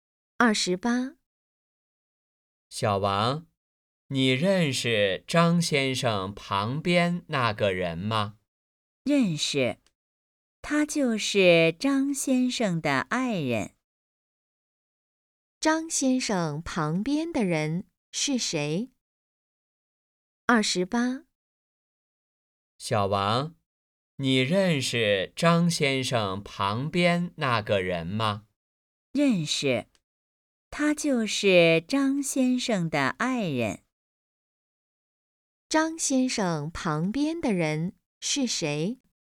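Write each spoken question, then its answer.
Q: 张先生旁边的人是谁?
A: 张先生的爱人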